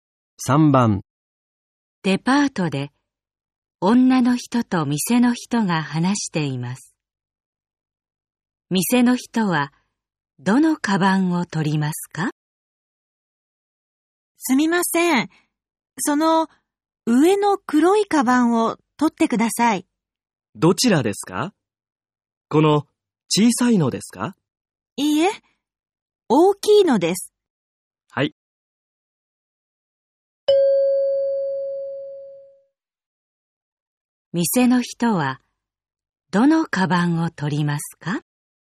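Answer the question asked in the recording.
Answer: 上の大きい黒いカバン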